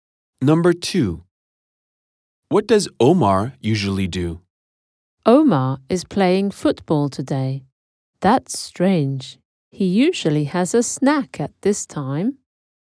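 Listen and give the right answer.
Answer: Has a snack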